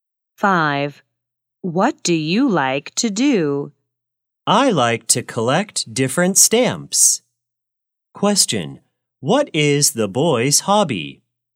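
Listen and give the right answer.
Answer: Collecting stamps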